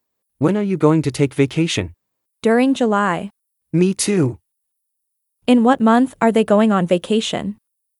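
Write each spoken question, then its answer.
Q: In what month are they going on vacation?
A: July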